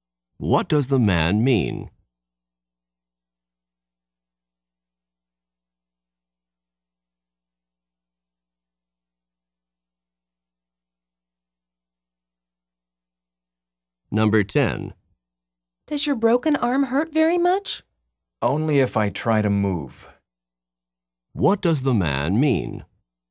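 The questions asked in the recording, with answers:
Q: What does the man mean?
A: It hurts only when he moves it.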